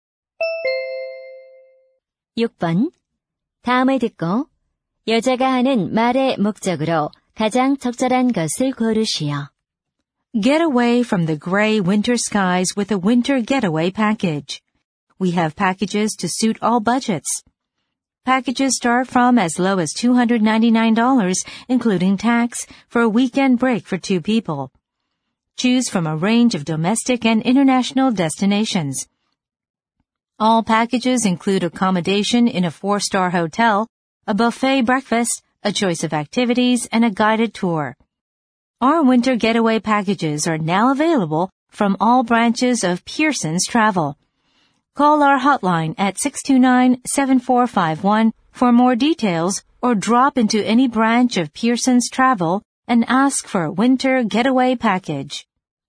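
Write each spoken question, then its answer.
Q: 다음을 듣고 여자가 하는 말의 목적으로 가장 적절한 것을 고르시오.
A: 겨울 여행 패키지 광고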